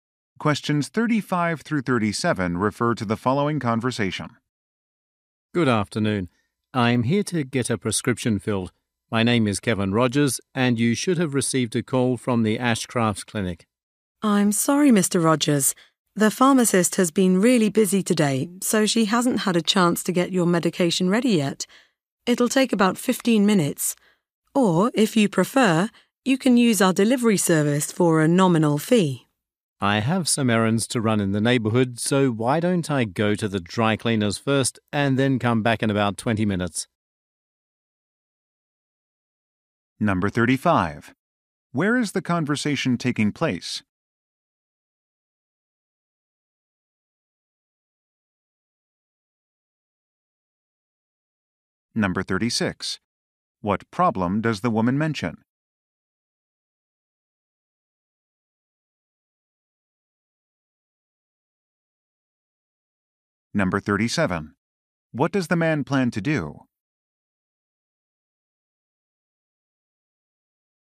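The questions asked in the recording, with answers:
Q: Where is the conversation taking place?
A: At a pharmacy

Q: What problem does the woman mention?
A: The medication is not ready yet

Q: What does the man plan to do?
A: Go to the dry cleaners and come back later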